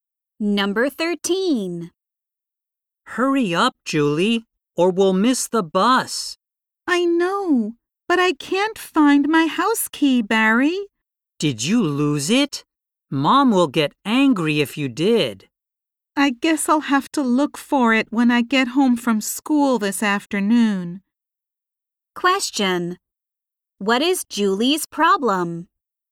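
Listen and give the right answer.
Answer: She can't find her house key.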